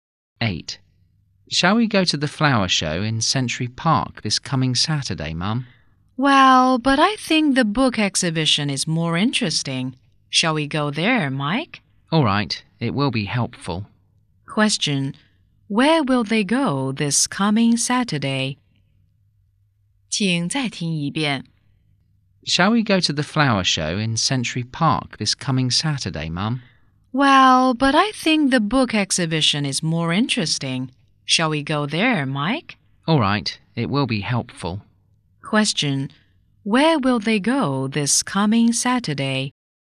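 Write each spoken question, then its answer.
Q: where will they go this coming Saturday?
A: To the book exhibition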